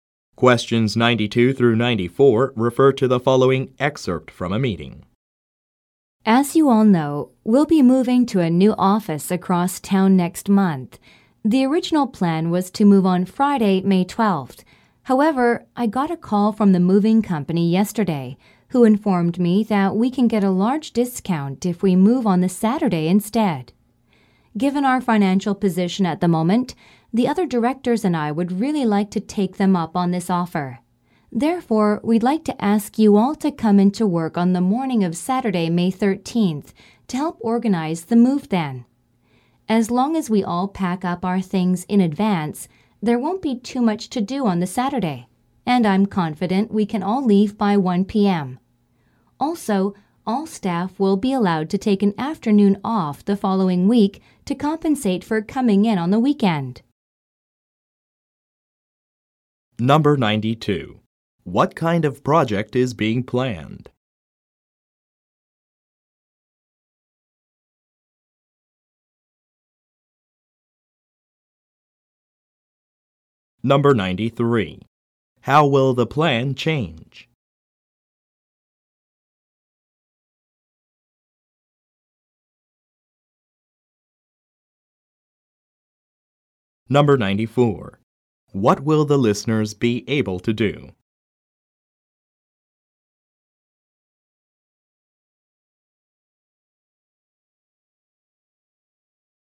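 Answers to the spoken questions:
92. An office move to a new location across town
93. The move will be on Saturday, May 13th instead of Friday, May 12th
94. Take an afternoon off the following week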